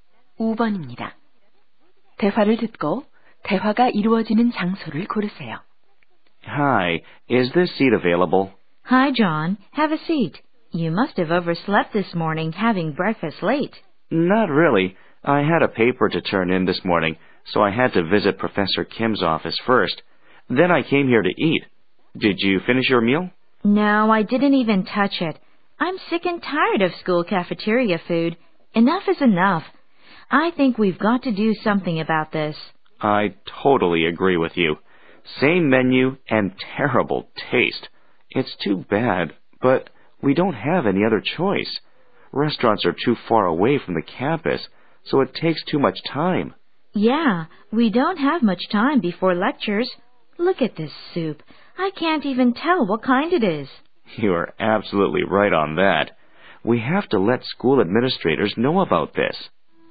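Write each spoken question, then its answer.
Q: 대화를 듣고 대화가 이루어지는 장소를 고르세요.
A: 학교 구내식당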